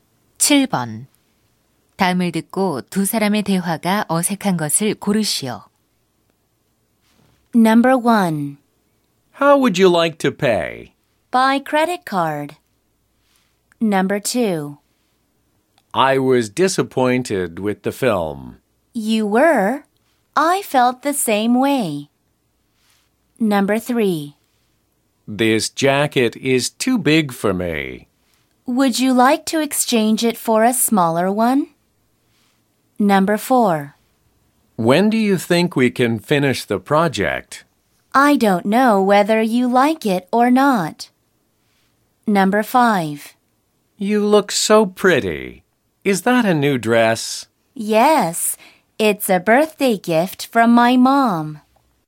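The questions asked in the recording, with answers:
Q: 다음을 듣고 두 사람의 대화가 어색한 것을 고르시오.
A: 4: When do you think we can finish the project? / I don't know whether you like it or not.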